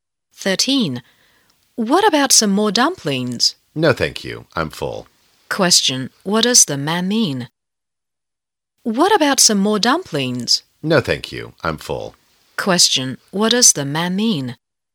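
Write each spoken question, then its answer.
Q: What does the man mean?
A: He doesn't want any more dumplings because he is full.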